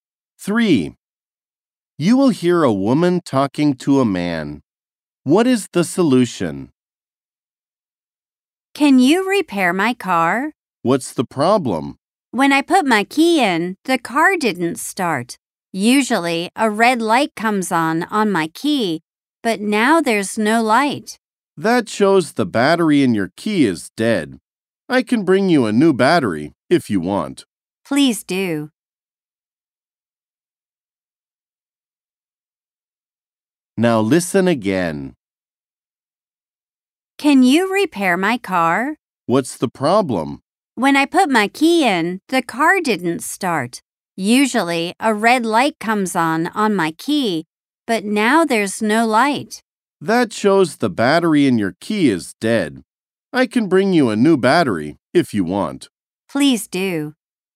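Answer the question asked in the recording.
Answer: Put a new battery in the key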